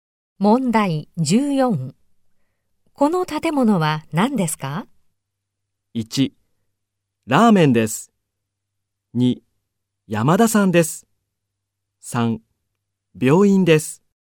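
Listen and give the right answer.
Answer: 3: 病院です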